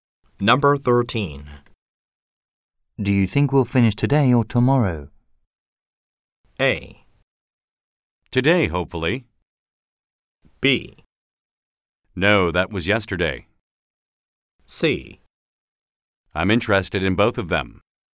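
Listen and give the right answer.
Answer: A: Today, hopefully.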